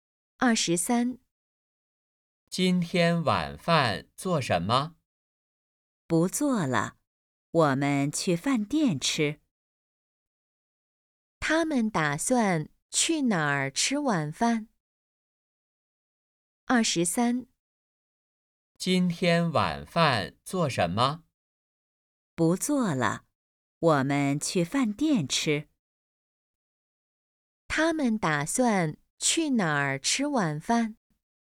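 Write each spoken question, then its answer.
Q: 他们打算去哪儿吃晚饭?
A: 饭店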